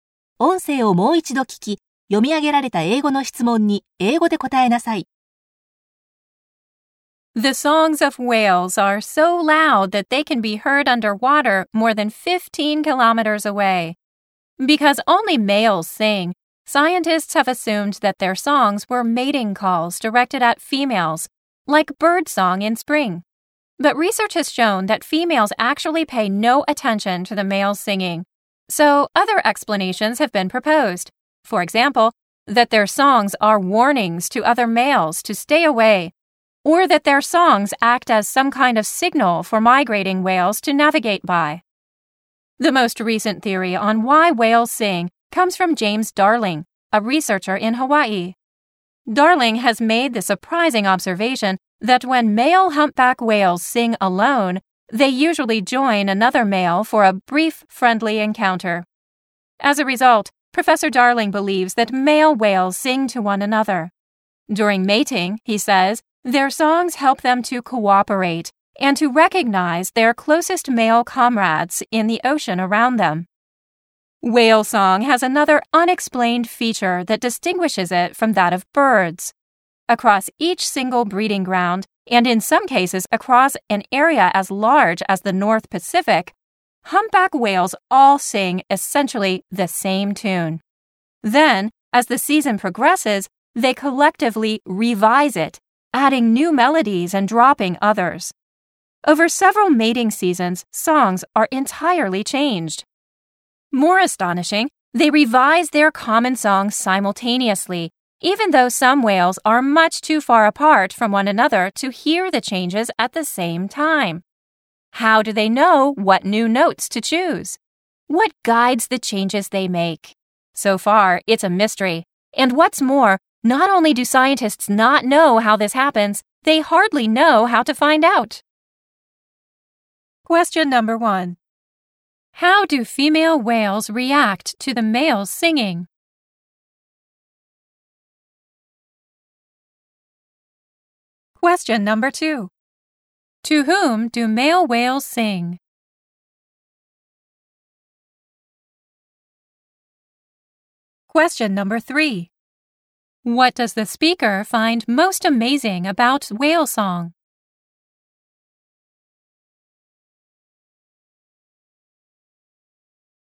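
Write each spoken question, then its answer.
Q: How do female whales react to the males singing?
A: They pay no attention to it.

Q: To whom do male whales sing?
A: To other male whales.

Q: What does the speaker find most amazing about whale song?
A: Whales revise their common song at the same time, even when they are too far apart to hear each other.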